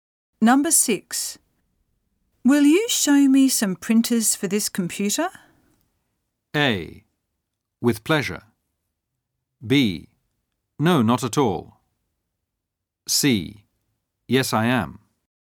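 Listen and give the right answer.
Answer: A: With pleasure.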